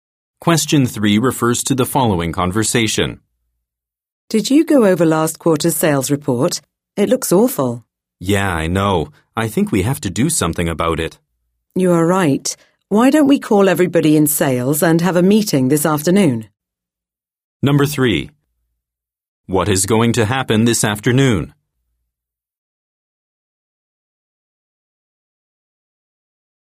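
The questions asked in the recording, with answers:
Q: What is going to happen this afternoon?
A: A meeting with the sales staff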